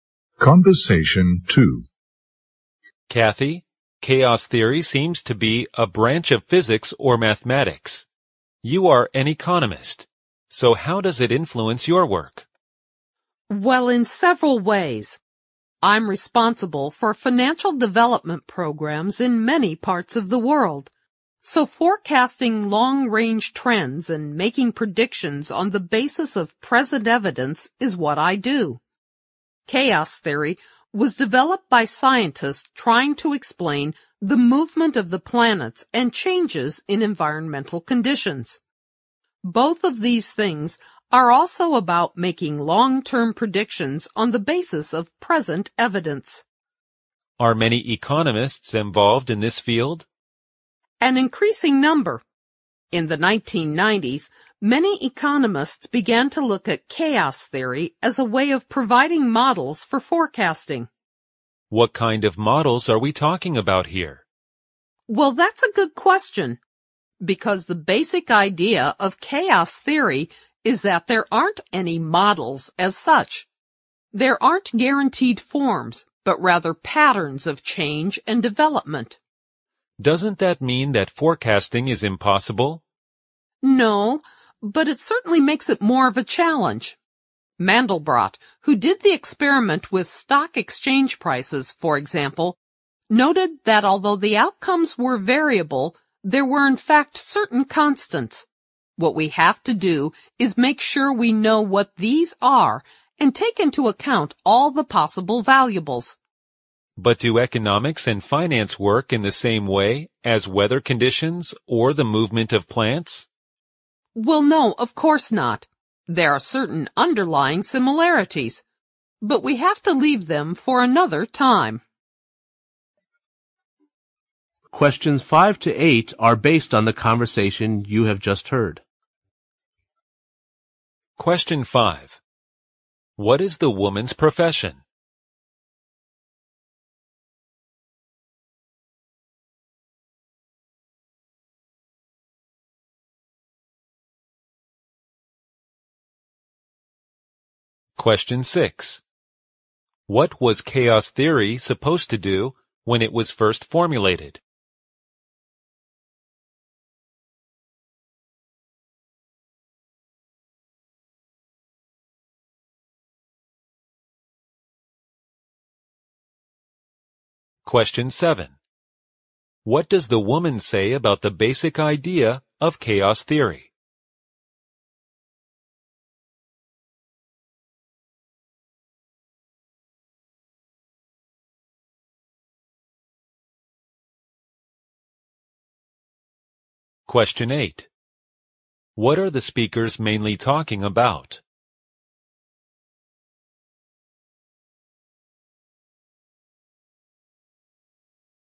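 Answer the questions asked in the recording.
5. An economist
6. Explain the movement of the planets and changes in environmental conditions
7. There aren't any models as such, only patterns of change and development
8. How chaos theory is applied to economic forecasting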